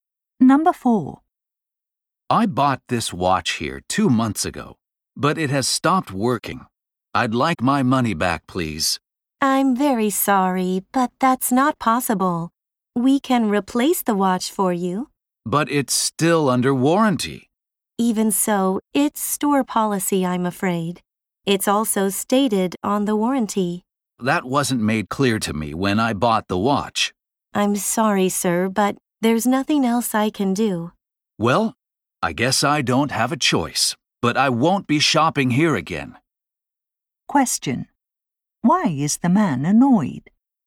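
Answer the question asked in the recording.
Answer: The store won't refund his money, only replace the watch.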